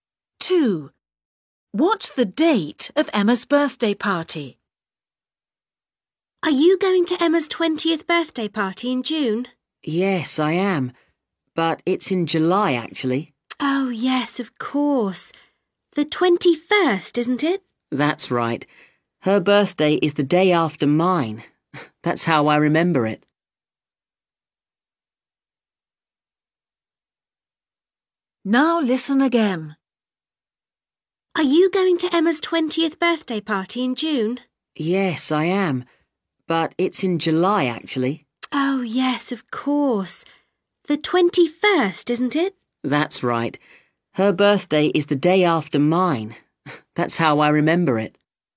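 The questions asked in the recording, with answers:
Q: What's the date of Emma's birthday party?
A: 21st July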